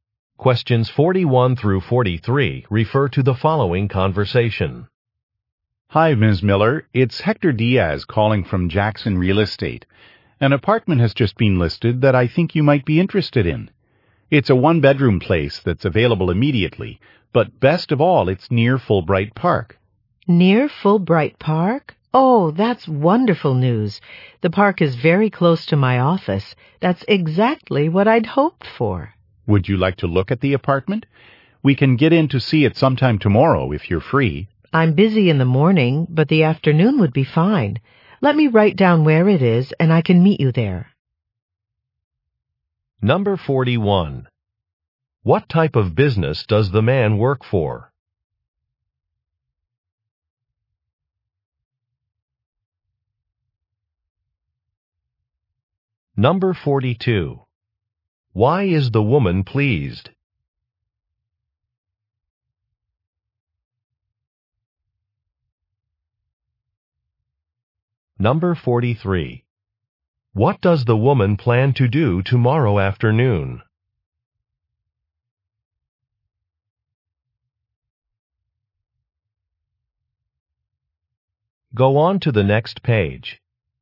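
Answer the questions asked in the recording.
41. A real estate agency
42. The apartment is near her office
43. Look at the apartment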